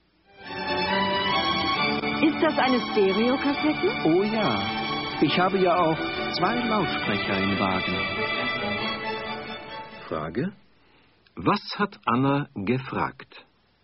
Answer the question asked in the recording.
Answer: Sie hat gefragt, ist das eine Stereokassette?